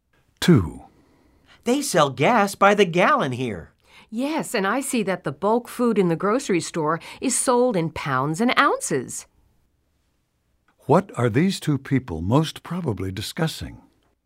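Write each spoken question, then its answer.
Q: What are these two people most probably discussing?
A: Units of measurement (gallons, pounds, ounces)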